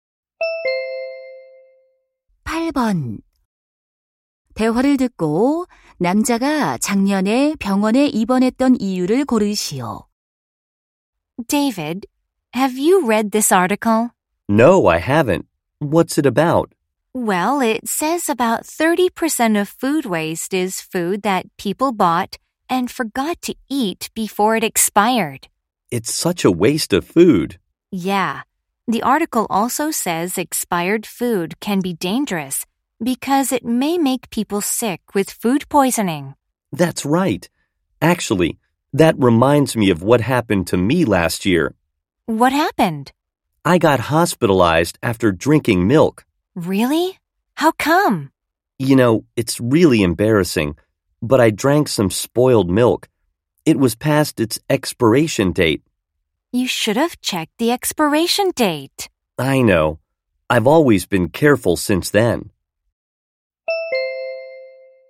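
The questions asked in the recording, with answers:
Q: 대화를 듣고 남자가 작년에 병원에 입원했던 이유를 고르시오.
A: 유통기한이 지난 상한 우유를 마셔서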